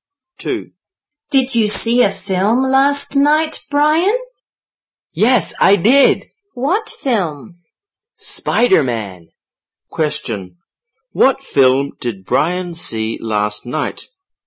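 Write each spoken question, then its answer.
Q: What film did Brian see last night?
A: Spider-Man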